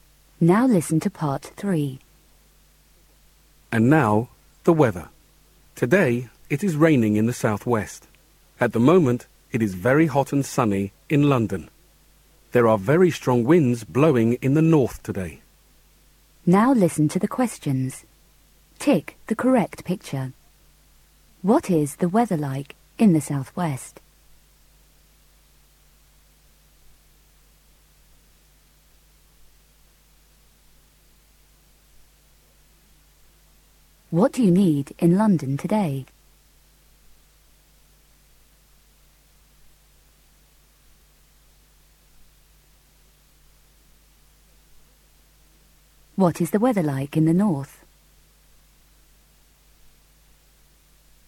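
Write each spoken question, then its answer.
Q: What is the weather like in the southwest?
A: Raining

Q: What is the weather like in the north?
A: Very windy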